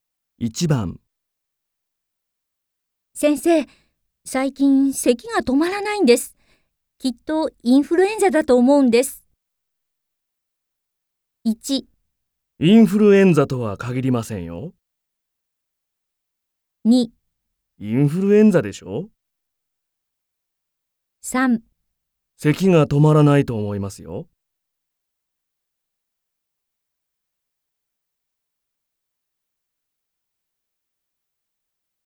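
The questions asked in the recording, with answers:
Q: 先生、最近咳が止まらないんです。きっとインフルエンザだと思うんです。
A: 1: インフルエンザとは限りませんよ。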